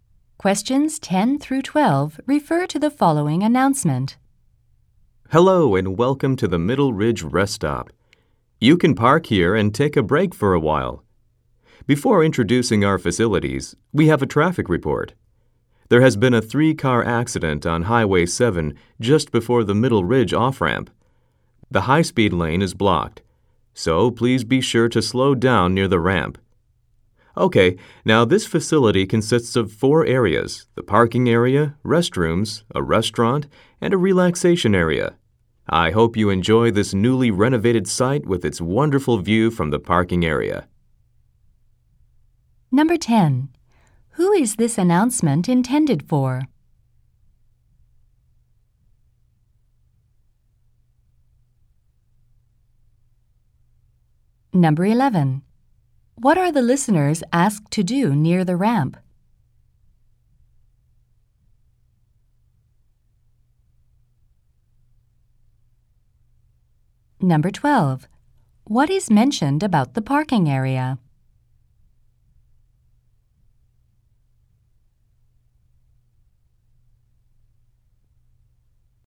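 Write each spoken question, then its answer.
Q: Who is this announcement intended for?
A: Drivers stopping at the rest stop

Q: What are the listeners asked to do near the ramp?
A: Slow down

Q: What is mentioned about the parking area?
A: It has a wonderful view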